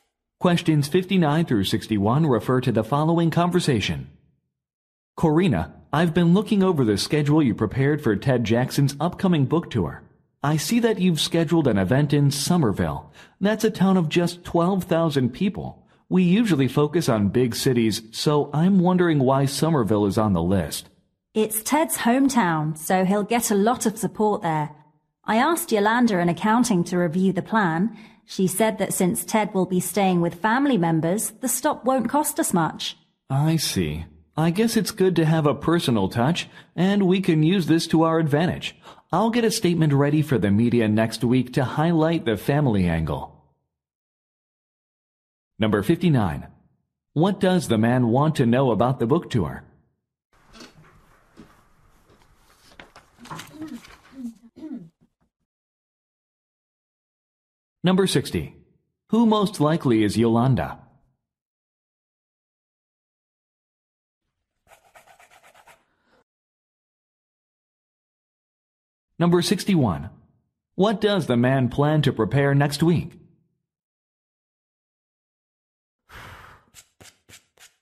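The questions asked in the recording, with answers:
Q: What does the man want to know about the book tour?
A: Why Somerville was included

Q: Who most likely is Yolanda?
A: An accountant

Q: What does the man plan to prepare next week?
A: A media statement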